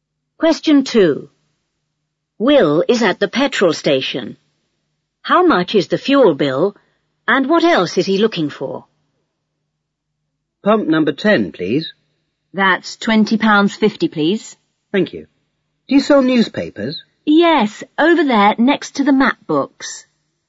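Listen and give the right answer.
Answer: £20.50; newspapers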